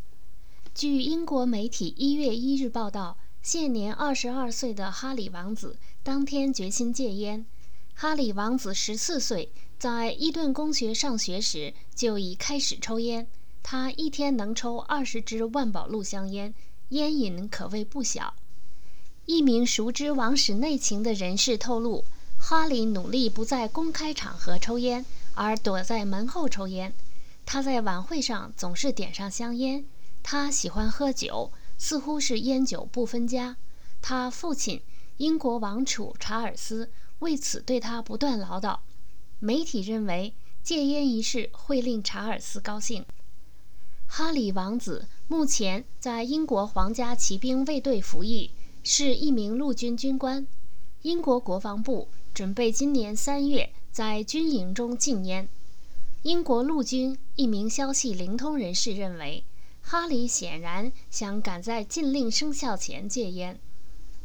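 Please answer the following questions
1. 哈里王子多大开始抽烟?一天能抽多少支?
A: 14岁开始抽烟,一天能抽20支

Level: 3rd Year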